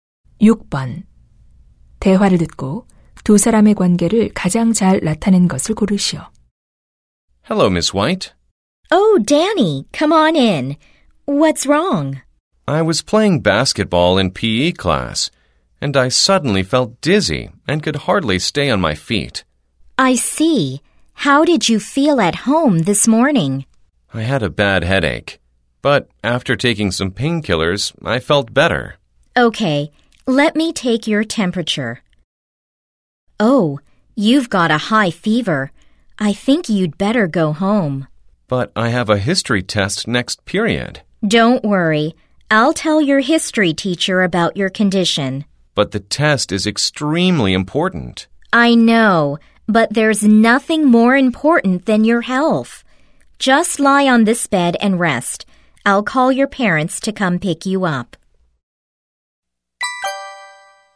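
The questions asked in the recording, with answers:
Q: 대화를 듣고 두 사람의 관계를 가장 잘 나타낸 것을 고르시오.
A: 보건 교사 - 학생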